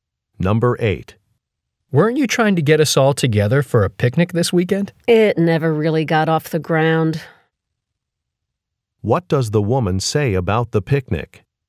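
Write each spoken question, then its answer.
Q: What does the woman say about the picnic?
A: It never got organized.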